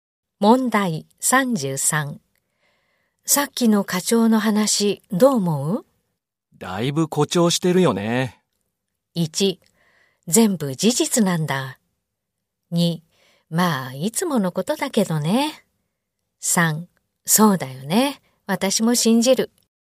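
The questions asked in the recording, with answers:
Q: さっきの課長の話どう思う?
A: 2: まあいつものことだけどね。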